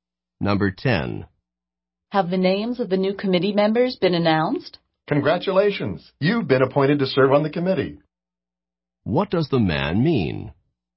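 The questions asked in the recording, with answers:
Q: What does the man mean?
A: Yes, and the woman has been appointed to the committee.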